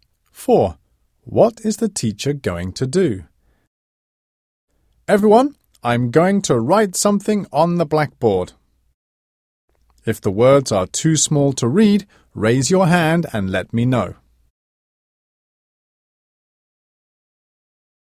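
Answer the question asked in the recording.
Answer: Write something on the blackboard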